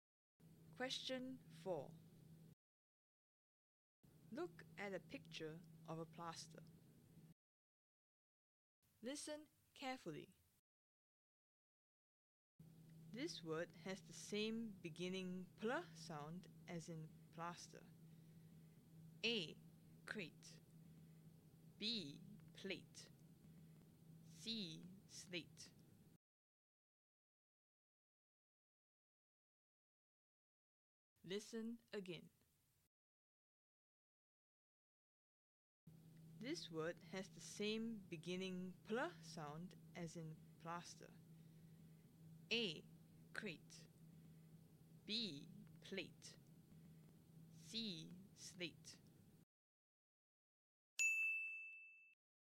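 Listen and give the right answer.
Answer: B: Plate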